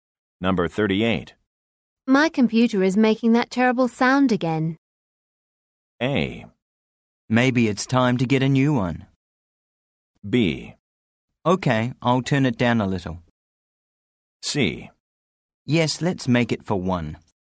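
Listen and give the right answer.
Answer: A: Maybe it's time to get a new one.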